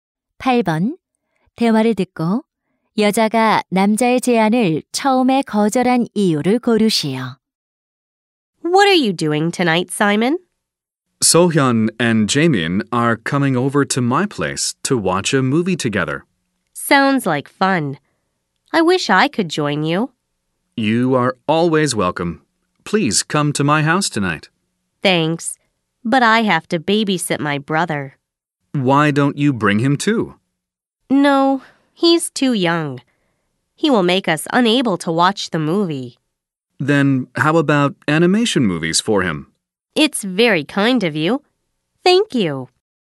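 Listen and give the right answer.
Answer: 남동생을 돌봐야 해서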